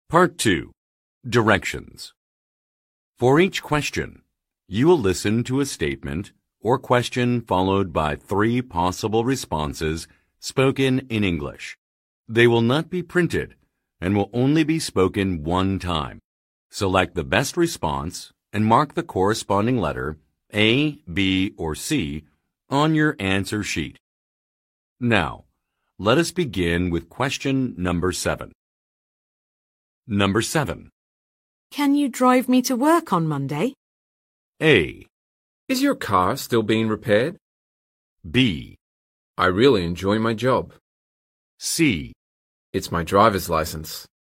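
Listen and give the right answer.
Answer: A. Is your car still being repaired?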